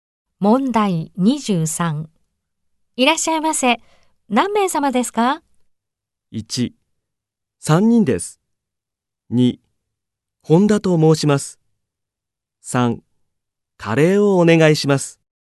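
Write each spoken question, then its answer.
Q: いらっしゃいませ。何名様ですか?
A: 1: 3人です。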